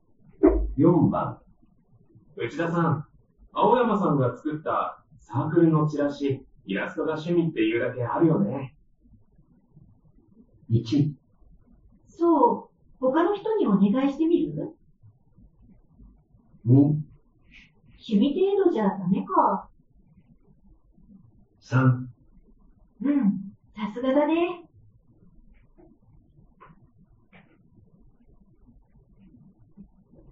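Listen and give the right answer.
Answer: 3: うん、さすがだね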